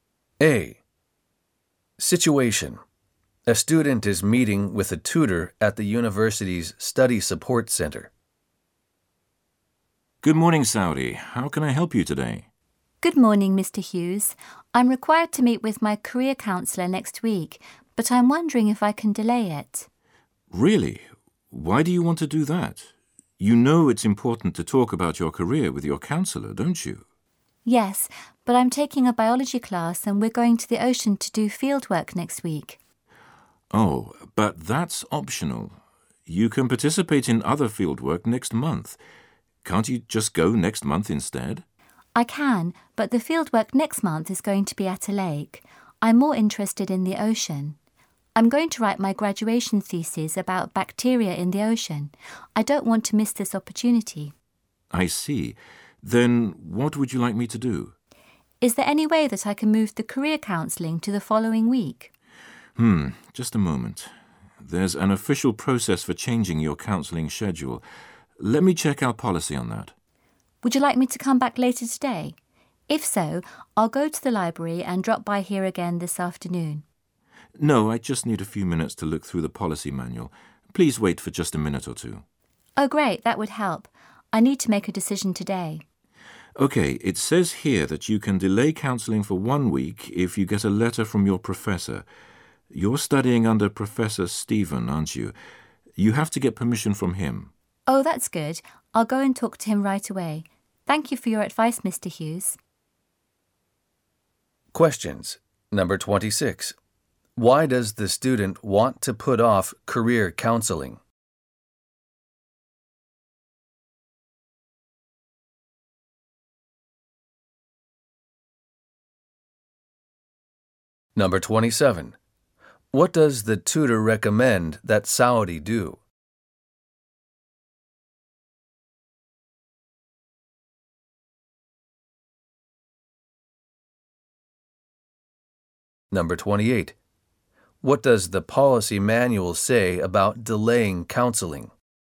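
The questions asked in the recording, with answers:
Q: Why does the student want to put off career counselling?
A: To go on ocean field work for her biology class

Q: What does the policy manual say about delaying counseling?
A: It can be delayed one week with a letter from the professor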